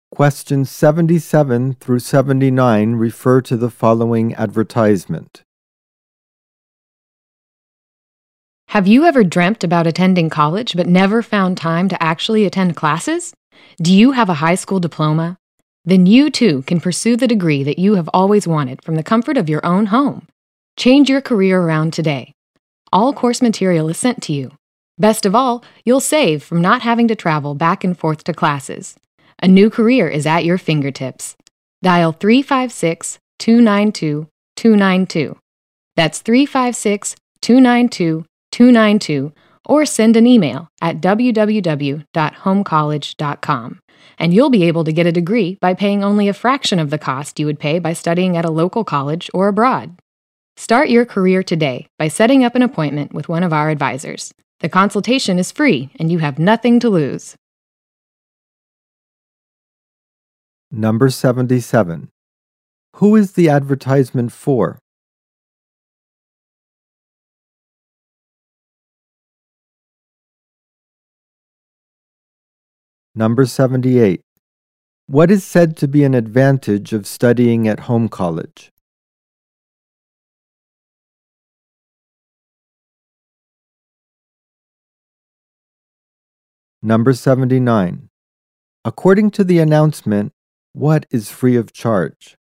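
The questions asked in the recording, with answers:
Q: Who is the advertisement for?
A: People who want a college degree but can't attend classes

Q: What is said to be an advantage of studying at home college?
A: Saving on travel to classes and lower cost

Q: According to the announcement, what is free of charge?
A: The consultation with an advisor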